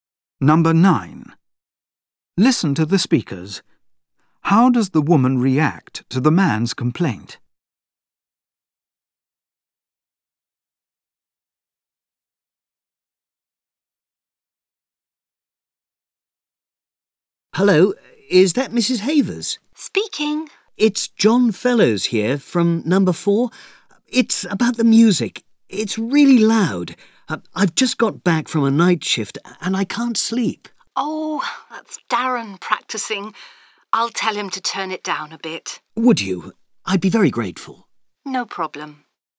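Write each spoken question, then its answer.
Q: How does the woman react to the man's complaint?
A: She is helpful and agrees to have the music turned down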